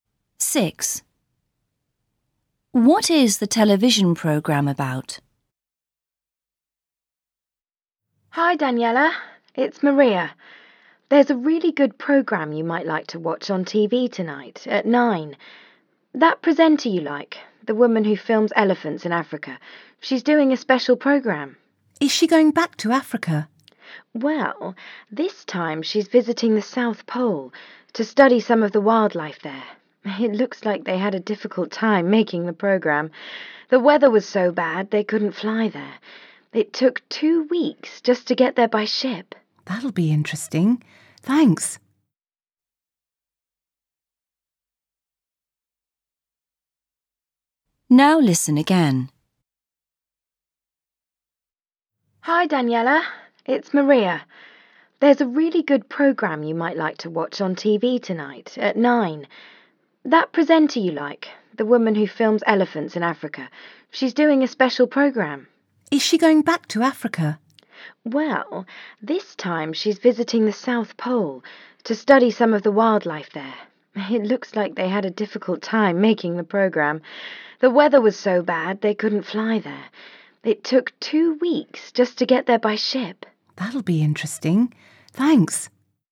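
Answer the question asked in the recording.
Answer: Wildlife at the South Pole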